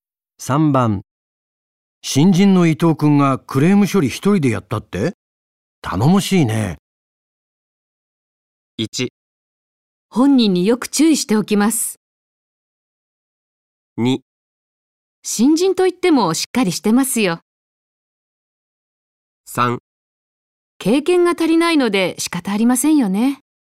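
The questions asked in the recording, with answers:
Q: 新人の伊藤くんがクレーム処理一人でやったって?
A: 2: 新人といってもしっかりしてますよ。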